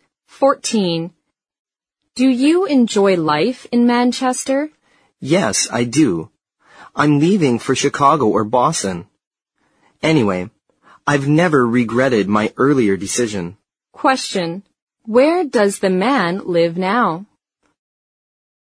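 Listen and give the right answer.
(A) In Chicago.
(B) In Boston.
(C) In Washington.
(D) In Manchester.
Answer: (D) In Manchester.

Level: 四级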